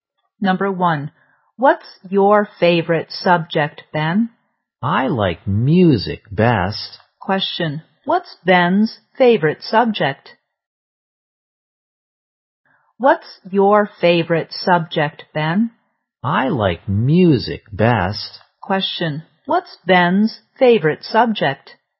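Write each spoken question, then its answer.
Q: What's Ben's favorite subject?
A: Music.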